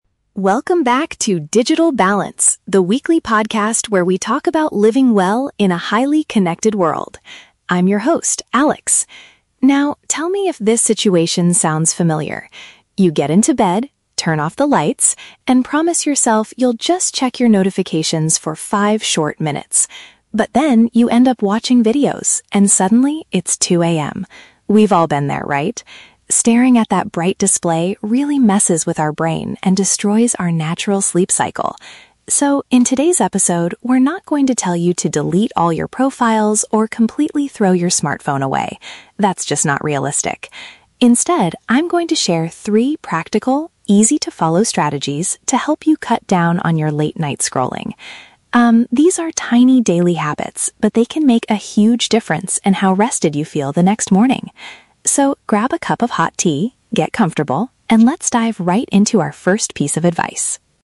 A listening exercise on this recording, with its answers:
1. What is the main topic of today's podcast episode?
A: Methods to decrease device usage before going to sleep.

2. What common problem does the host describe at the beginning?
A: People losing track of time while looking at their phones in bed.

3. How does the host describe the advice he is going to share?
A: They are small behavioral changes that are simple to apply.

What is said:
Alex (Podcast Host): Welcome back to 'Digital Balance', the weekly podcast where we talk about living well in a highly connected world. I'm your host, Alex. Now, tell me if this situation sounds familiar. You get into bed, turn off the lights, and promise yourself you'll just check your notifications for five short minutes. But then, you end up watching videos, and suddenly, it's 2 AM. We've all been there, right? Staring at that bright display really messes with our brain and destroys our natural sleep cycle. So, in today's episode, we're not going to tell you to delete all your profiles or completely throw your smartphone away. That's just not realistic. Instead, I'm going to share three practical, easy-to-follow strategies to help you cut down on your late-night scrolling. Um, these are tiny daily habits, but they can make a huge difference in how rested you feel the next morning. So, grab a cup of hot tea, get comfortable, and let's dive right into our first piece of advice.